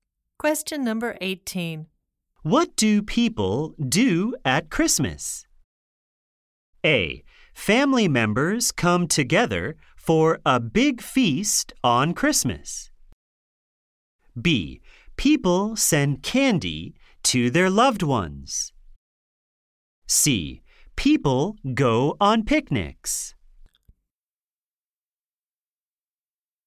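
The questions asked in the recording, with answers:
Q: What do people do at Christmas?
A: A: Family members come together for a big feast on Christmas.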